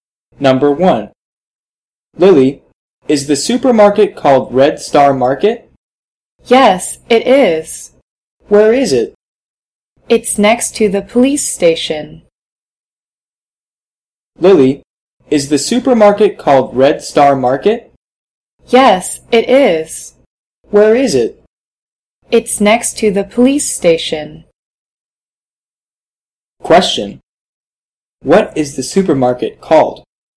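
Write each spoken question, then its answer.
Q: What is the supermarket called?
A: Red Star Market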